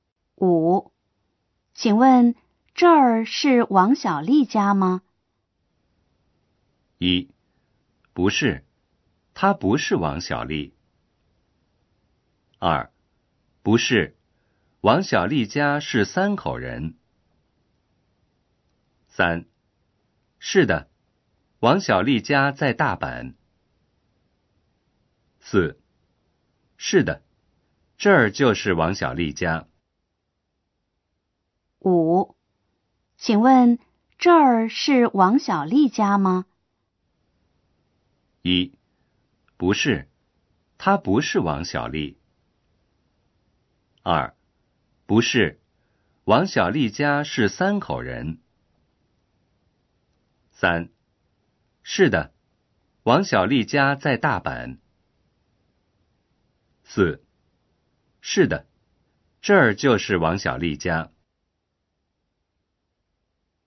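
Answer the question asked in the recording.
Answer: 4: 是的,这儿就是王小丽家。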